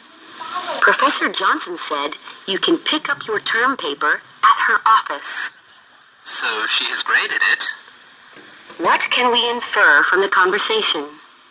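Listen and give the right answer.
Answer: The professor has graded the term paper.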